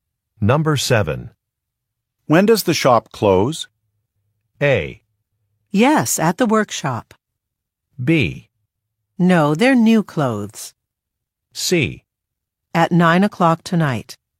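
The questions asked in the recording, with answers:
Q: When does the shop close?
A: C: At 9 o'clock tonight.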